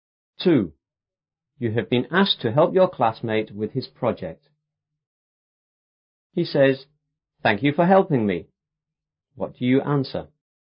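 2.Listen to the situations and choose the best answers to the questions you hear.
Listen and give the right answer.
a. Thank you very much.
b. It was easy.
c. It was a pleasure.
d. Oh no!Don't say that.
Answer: c. It was a pleasure.

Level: 初中英语广州版5B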